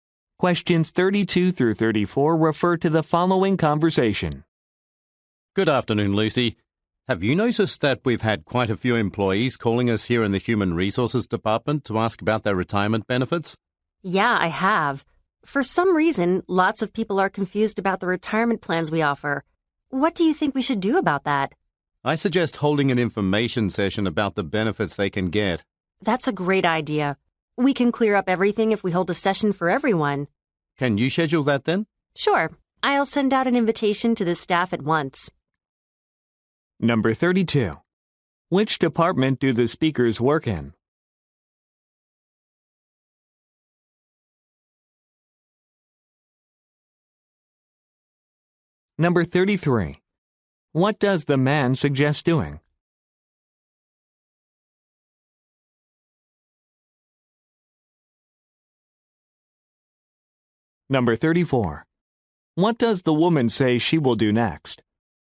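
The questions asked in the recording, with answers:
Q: Which department do the speakers work in?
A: Human Resources

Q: What does the man suggest doing?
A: Holding an information session about benefits

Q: What does the woman say she will do next?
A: Send an invitation to the staff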